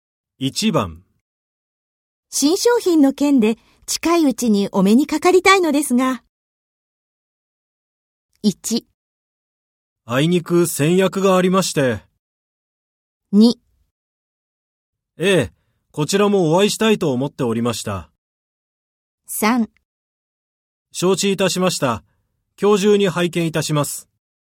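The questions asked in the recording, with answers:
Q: 新商品の件で近いうちにお目にかかりたいのですが。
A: 2: ええ、こちらもお会いしたいと思っておりました。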